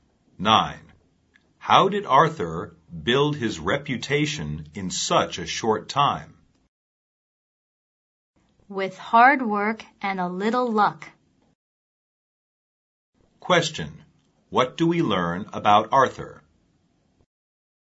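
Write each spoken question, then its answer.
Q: What do we learn about Arthur?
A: He built his reputation through hard work and a little luck.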